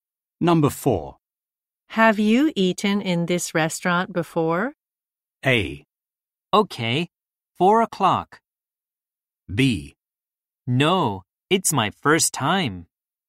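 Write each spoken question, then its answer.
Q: Have you eaten in this restaurant before?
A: B: No. It's my first time.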